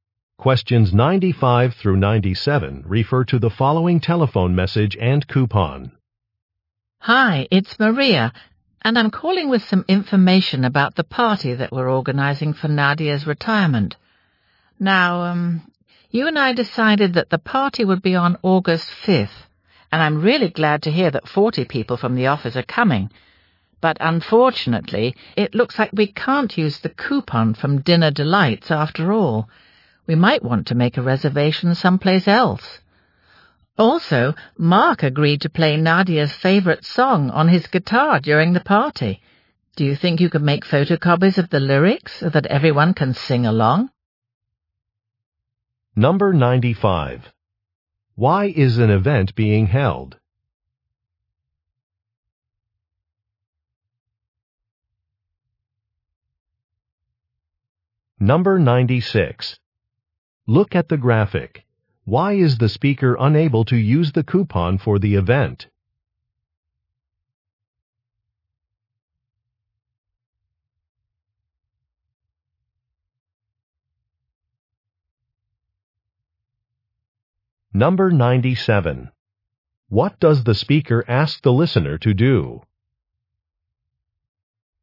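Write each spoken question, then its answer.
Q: Why is an event being held?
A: For Nadia's retirement

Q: What does the speaker ask the listener to do?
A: Make photocopies of the song lyrics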